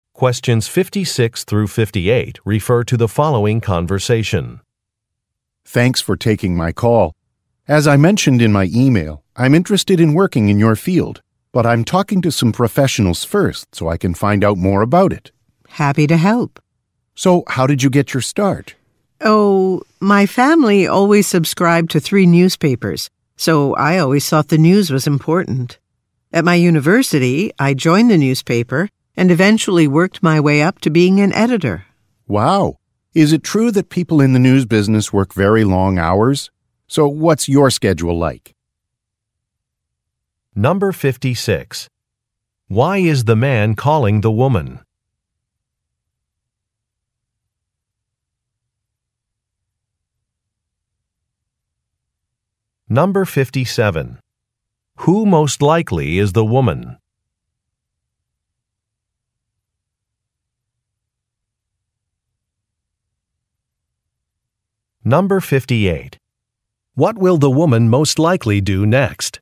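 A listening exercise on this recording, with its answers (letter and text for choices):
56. Why is the man calling the woman?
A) To plan a company event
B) To confirm a work deadline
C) To discuss a career path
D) To accept a job offer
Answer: C) To discuss a career path

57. Who most likely is the woman?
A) A newspaper editor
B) A university professor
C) A delivery person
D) A professional actor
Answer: A) A newspaper editor

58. What will the woman most likely do next?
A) Negotiate a contract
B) Explain an office policy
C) Review a résumé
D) Describe a work schedule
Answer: D) Describe a work schedule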